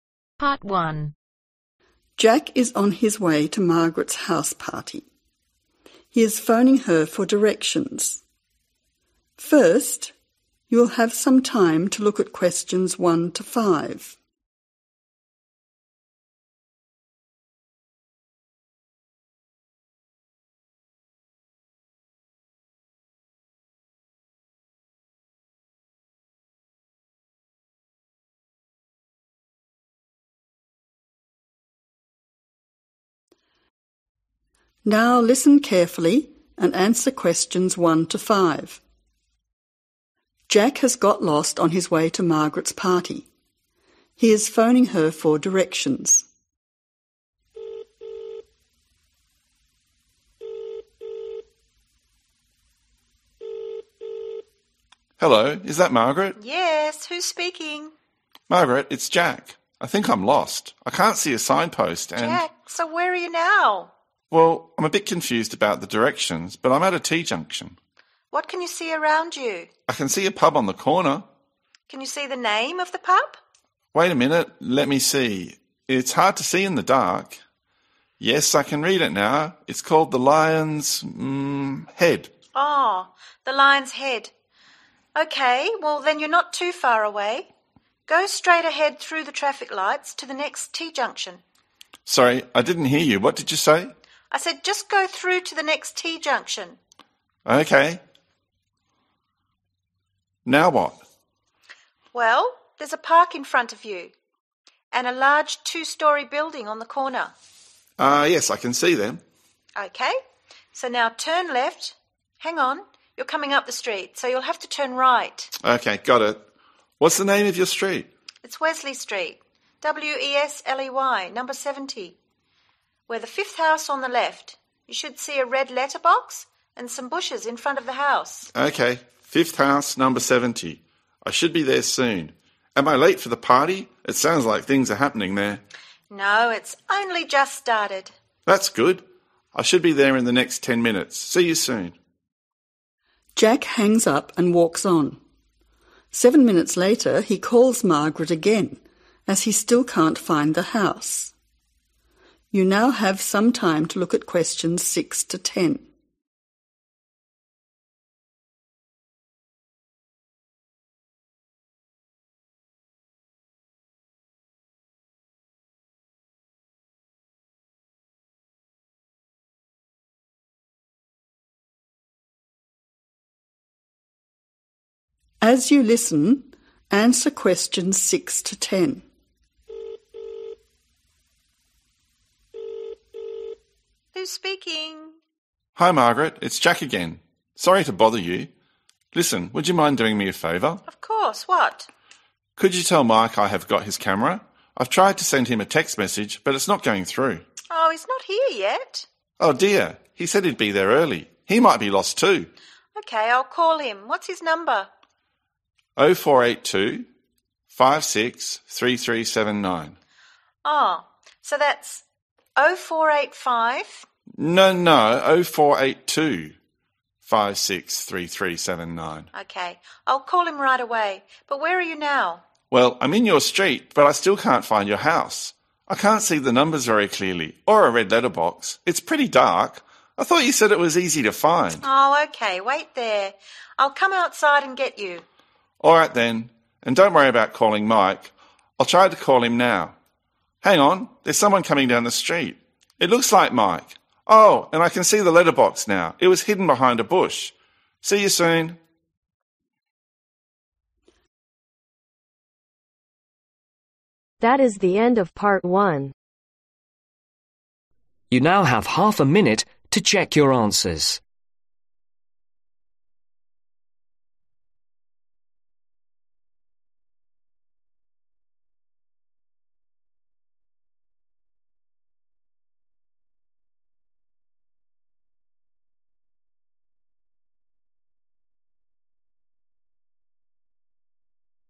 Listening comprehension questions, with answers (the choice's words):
Choose the correct letter A , B , or C.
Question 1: What is the name of the pub ?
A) The Lines Ahead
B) The Lion's Shed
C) The Lion's Head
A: The Lion's Head

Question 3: Street: ............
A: Wesley

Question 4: Number: ............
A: 70

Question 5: Location: ............ house on the left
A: Fifth

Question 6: Which statement is correct ?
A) Jack has got Mike's camera.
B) Mike has got Jack's camera.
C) Mike has sent Jack a text message.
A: Jack has got Mike's camera.

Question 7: Jack is worried that Mike may be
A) late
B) lost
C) early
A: lost

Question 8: 048 ............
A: 2563379